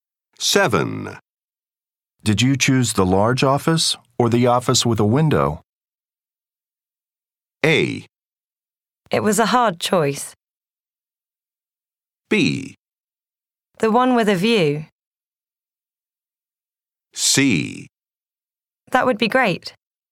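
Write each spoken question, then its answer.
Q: Did you choose the large office or the office with a window?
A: B: The one with a view.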